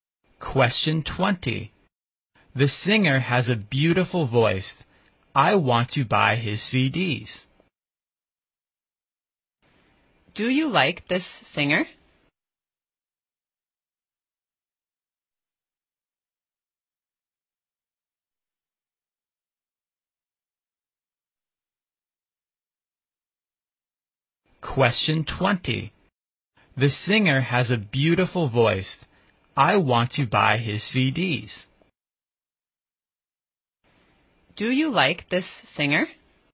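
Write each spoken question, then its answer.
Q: Do you like this singer?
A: Yes, he has a beautiful voice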